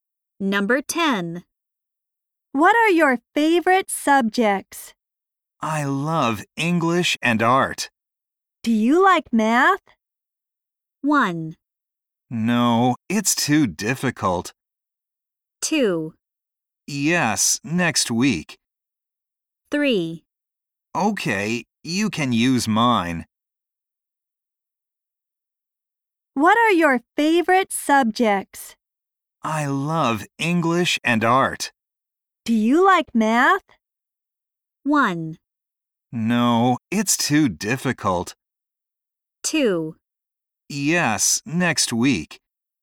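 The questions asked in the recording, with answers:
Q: Do you like math?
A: 1: No, it's too difficult.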